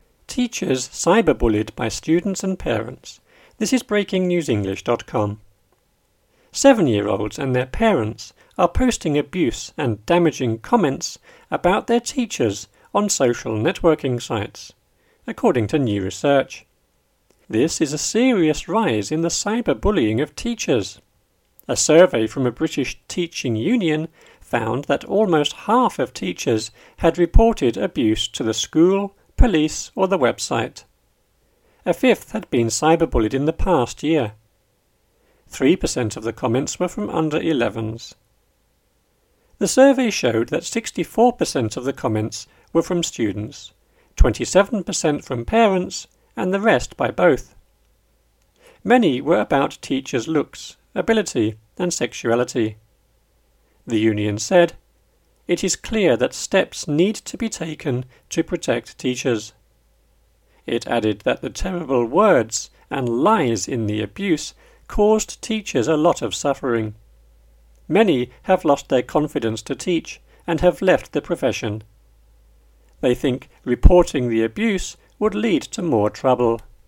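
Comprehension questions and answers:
Listen and choose the correct word in the grey box with the "up / down" arrows.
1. Seven-year-olds and their are posting and damaging comments about their teachers on networking sites, to new research.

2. A from a British teaching found that almost of teachers had reported abuse to the school, police or the .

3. A fifth had been cyber-bullied in the year.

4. Three per cent of the comments were from .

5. The survey showed that 64% of the were from students, 27% from parents, and the by both.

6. Many were about teachers' , ability, and sexuality.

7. The said: "It is clear that need to be taken to protect teachers."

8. It added that the words and lies in the abuse caused teachers a lot of .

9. Many have lost their to teach and have left the .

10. They think reporting the abuse would lead to more .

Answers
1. parents / abuse / social / according
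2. survey / union / half / website
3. past
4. under-11s
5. comments / rest
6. looks
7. union / steps
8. terrible / suffering
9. confidence / profession
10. trouble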